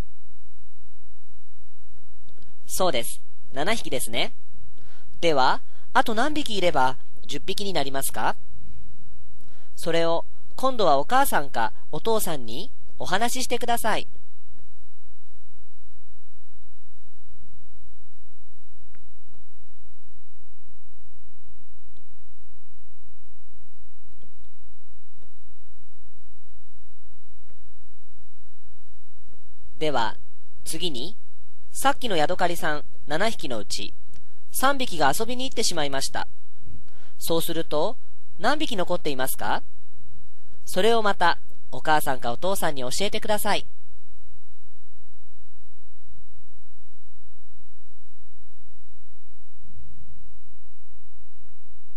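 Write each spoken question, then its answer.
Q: ではあと何匹いれば10匹になりますか。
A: 3匹

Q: そうすると何匹残っていますか。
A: 4匹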